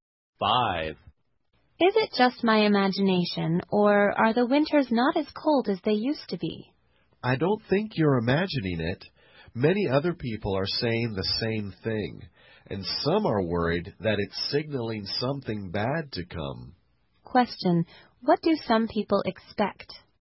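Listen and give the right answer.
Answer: Something bad to come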